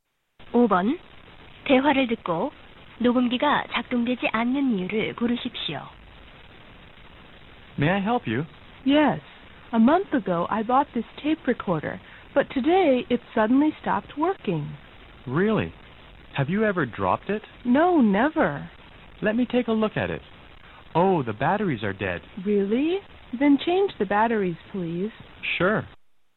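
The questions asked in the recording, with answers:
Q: 5번 대화를 듣고 녹음기가 작동되지 않는 이유를 고르십시오.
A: 건전지가 다 닳아서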